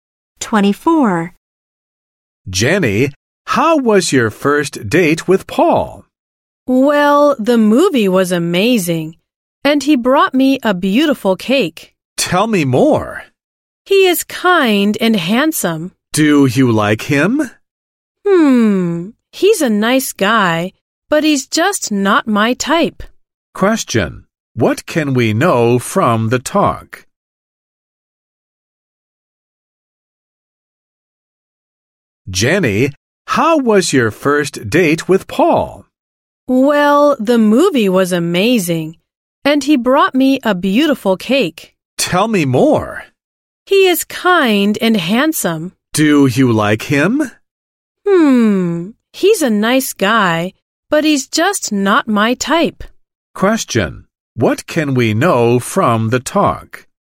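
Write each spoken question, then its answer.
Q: What can we know from the talk?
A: Jenny thinks Paul is nice but not her type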